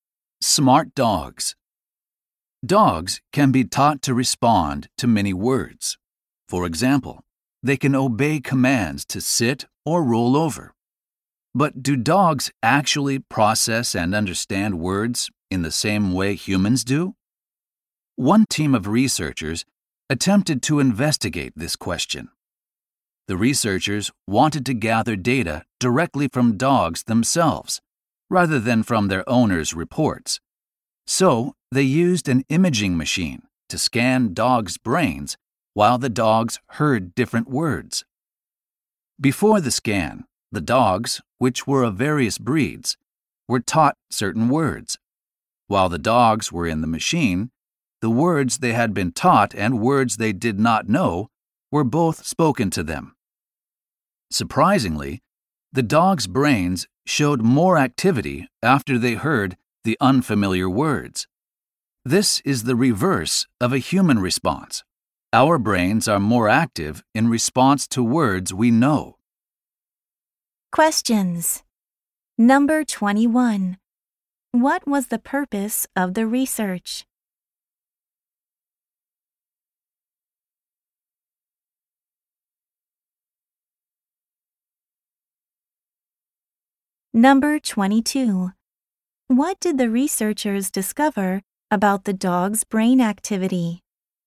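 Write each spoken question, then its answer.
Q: What was the purpose of the research?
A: To learn whether dogs process and understand words the same way humans do.

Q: What did the researchers discover about the dog's brain activity?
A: It was higher after hearing unfamiliar words, the opposite of humans.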